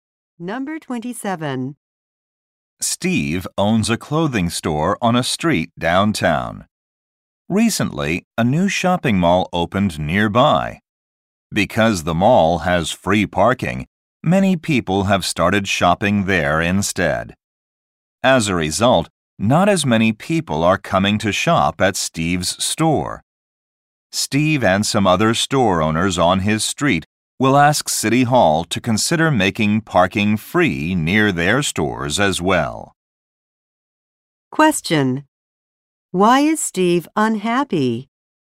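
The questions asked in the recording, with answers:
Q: Why is Steve unhappy?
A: Fewer people come to his store because of the new mall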